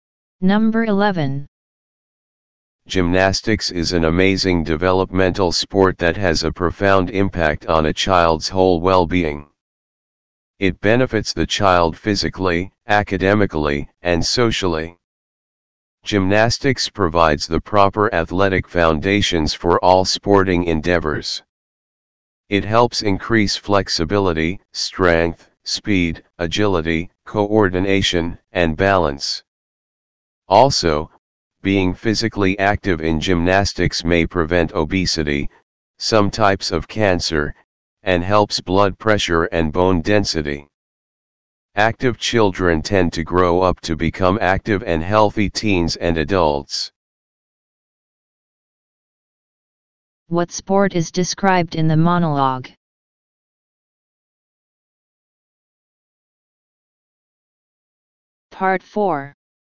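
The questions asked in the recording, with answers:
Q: What sport is described in the monologue?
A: Gymnastics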